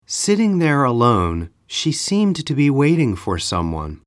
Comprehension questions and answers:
英文の音声を聞いて空所のことばを記入しなさい。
( ) there alone, she seemed ( ) ( ) ( ) for someone.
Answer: Sitting, to be waiting